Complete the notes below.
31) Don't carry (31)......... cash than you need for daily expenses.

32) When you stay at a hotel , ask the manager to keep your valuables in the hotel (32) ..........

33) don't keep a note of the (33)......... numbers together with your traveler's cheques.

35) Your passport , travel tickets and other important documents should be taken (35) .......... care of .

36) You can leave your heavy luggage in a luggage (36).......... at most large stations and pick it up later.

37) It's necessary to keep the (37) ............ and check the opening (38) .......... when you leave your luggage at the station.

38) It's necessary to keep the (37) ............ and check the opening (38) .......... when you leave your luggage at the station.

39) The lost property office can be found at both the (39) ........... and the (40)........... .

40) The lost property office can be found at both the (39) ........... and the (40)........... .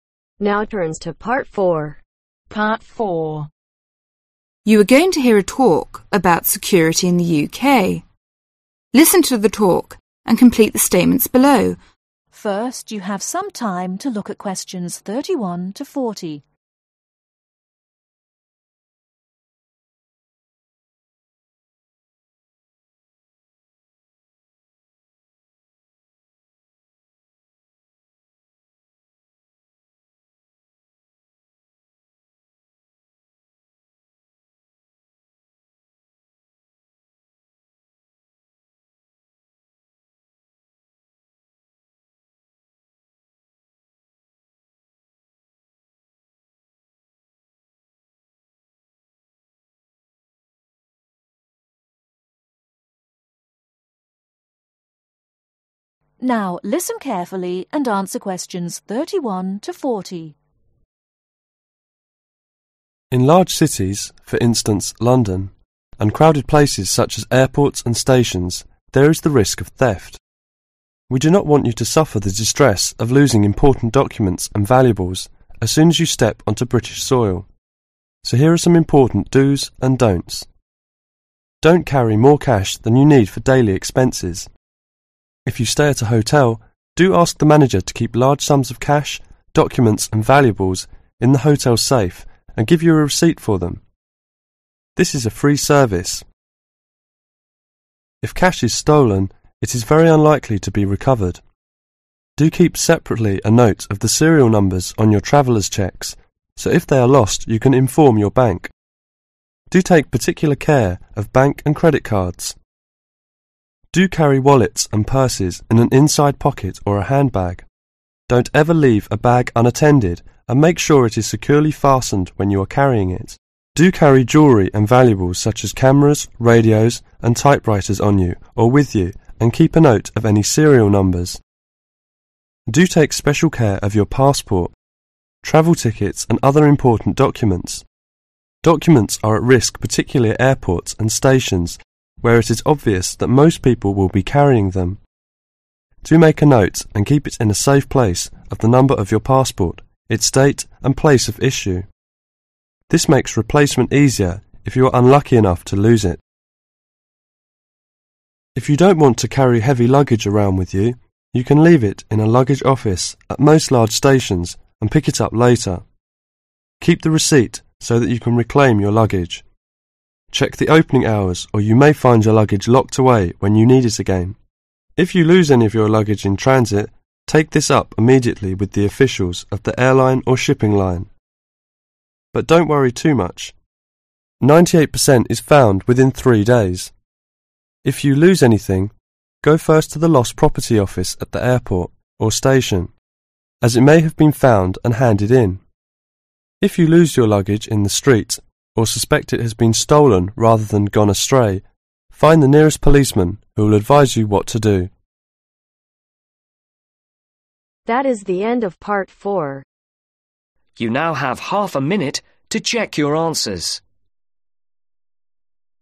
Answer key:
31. MORE
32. SAFE
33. SERIAL
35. SPECIAL
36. OFFICE
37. RECEIPT
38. HOURS
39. AIRPORT
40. STATION